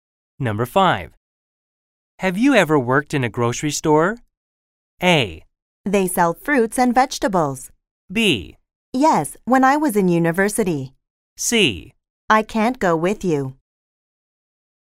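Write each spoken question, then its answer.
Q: Have you ever worked in a grocery store?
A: B: Yes, when I was in university.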